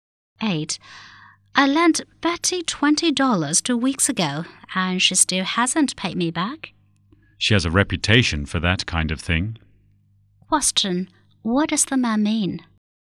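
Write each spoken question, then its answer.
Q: What does the man mean?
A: Betty often doesn't pay back money she borrows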